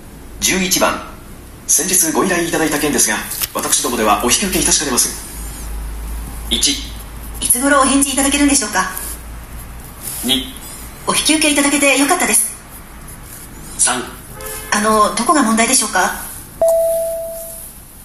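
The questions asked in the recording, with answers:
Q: 先日ご依頼いただいた件ですが私どもではお引き受けいたしかねます。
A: 3: あのどこが問題でしょうか。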